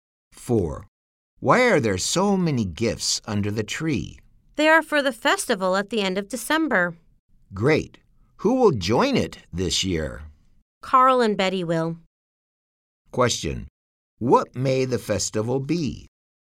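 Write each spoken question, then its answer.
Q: What may the festival be?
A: Christmas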